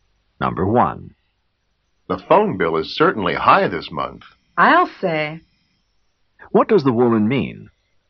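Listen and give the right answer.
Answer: She agrees that the phone bill is very high.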